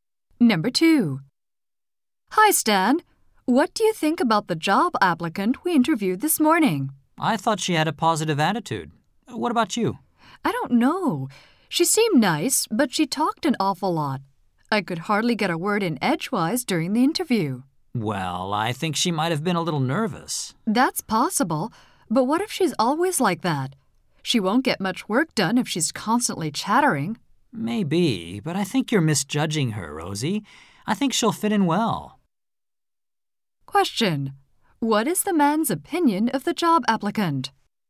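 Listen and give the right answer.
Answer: She has a positive attitude and will fit in well.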